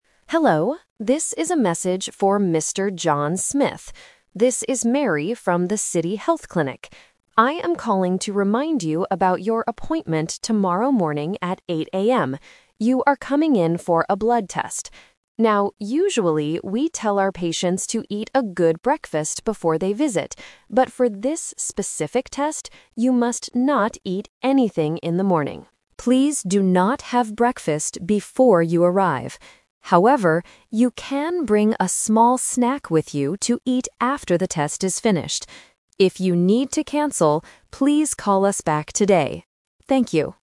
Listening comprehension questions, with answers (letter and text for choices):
Listen to a voicemail message from a clinic assistant. Choose the correct answer (A, B, or C) for each question.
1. Why is the clinic assistant calling Mr. Smith?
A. To cancel his appointment for tomorrow.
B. To remind him about his blood test.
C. To ask him to pay for his medical bill.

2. What is the most important rule for Mr. Smith tomorrow morning?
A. He must not eat any food before he arrives.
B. He should eat a very big breakfast.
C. He needs to arrive at the clinic before 7:00 AM.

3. What can Mr. Smith bring to the clinic?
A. Some medicine to take in the morning.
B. A bottle of hot water.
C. Some food to eat later.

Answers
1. B. To remind him about his blood test.
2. A. He must not eat any food before he arrives.
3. C. Some food to eat later.

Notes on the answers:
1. The assistant says, "I am calling to remind you about your appointment... You are coming in for a blood test."
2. The assistant clearly states, "you must not eat anything in the morning. Please do not have breakfast."
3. The assistant tells him, "you can bring a small snack with you to eat after the test is finished." A snack is some food to eat later.

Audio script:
Assistant: Hello, this is a message for Mr. John Smith. This is Mary from the City Health Clinic. I am calling to remind you about your appointment tomorrow morning at 8:00 AM. You are coming in for a blood test. Now, usually, we tell our patients to eat a good breakfast before they visit. But for this specific test, you must not eat anything in the morning. Please do not have breakfast before you arrive. However, you can bring a small snack with you to eat after the test is finished. If you need to cancel, please call us back today. Thank you.